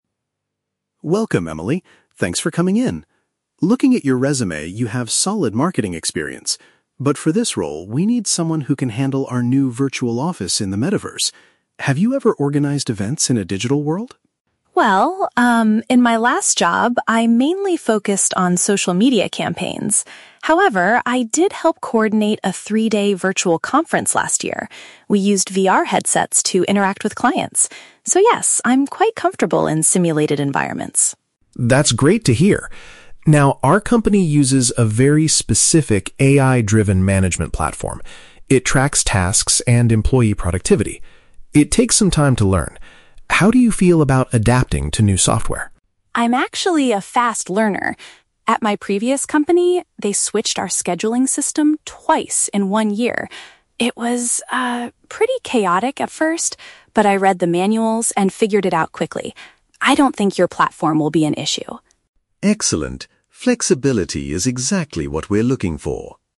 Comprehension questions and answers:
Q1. What did the applicant do that proves she can work in a digital world?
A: She arranged a multi-day event using virtual reality.

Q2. What is the main function of the company's management platform?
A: To monitor the staff's daily duties and output.

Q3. Why is Emily confident about learning the new AI software?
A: She successfully dealt with system changes in the past.

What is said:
Interviewer: Welcome, Emily. Thanks for coming in. Looking at your resume, you have solid marketing experience. But for this role, we need someone who can handle our new virtual office in the Metaverse. Have you ever organized events in a digital world?
Candidate: Well, um, in my last job, I mainly focused on social media campaigns. However, I did help coordinate a three-day virtual conference last year. We used VR headsets to interact with clients. So, yes, I'm quite comfortable in simulated environments.
Interviewer: That's great to hear. Now, our company uses a very specific AI-driven management platform. It tracks tasks and employee productivity. It takes some time to learn. How do you feel about adapting to new software?
Candidate: I'm actually a fast learner. At my previous company, they switched our scheduling system twice in one year! It was, ah, pretty chaotic at first, but I read the manuals and figured it out quickly. I don't think your platform will be an issue.